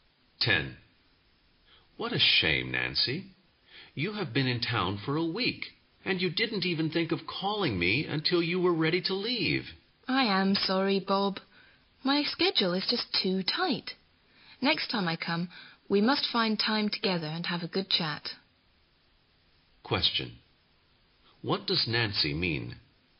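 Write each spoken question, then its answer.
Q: What does Nancy mean?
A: She was too busy to call him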